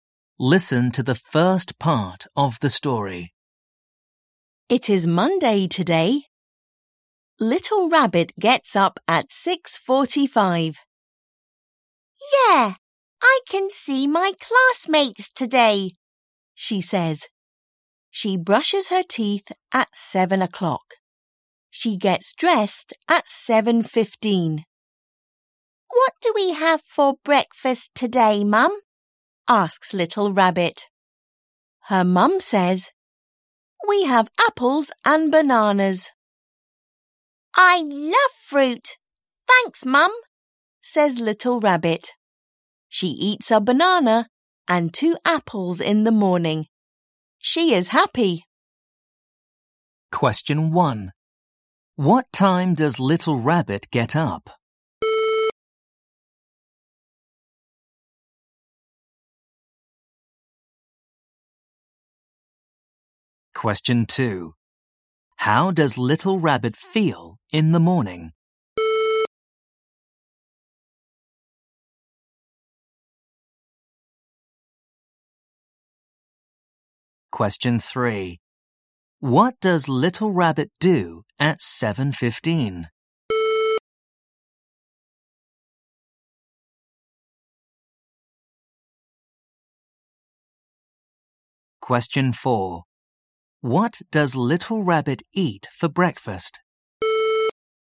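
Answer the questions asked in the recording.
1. At 6:45
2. Happy
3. She gets dressed
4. A banana and 2 apples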